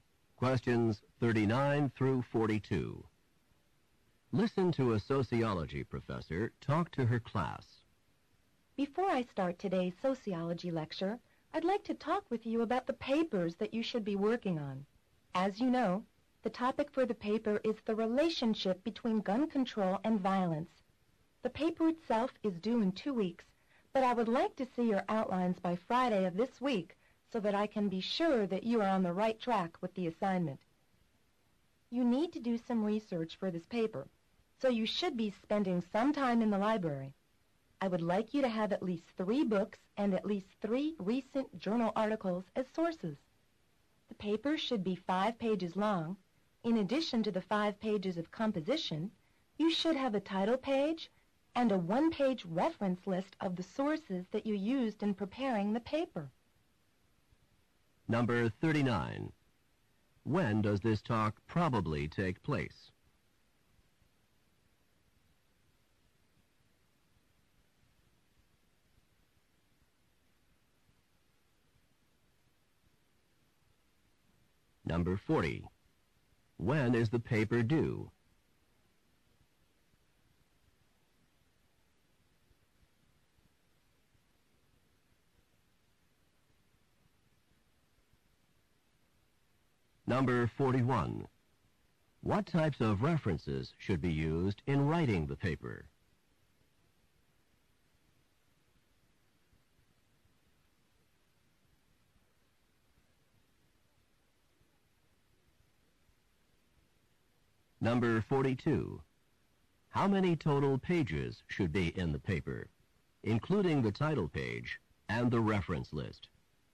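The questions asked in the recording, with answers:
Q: When does this talk probably take place?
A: At the start of a sociology class, before the lecture

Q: When is the paper due?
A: In 2 weeks

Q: What types of references should be used in writing the paper?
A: Books and recent journal articles

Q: how many total pages should be in the paper, including the title page and the reference list.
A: Seven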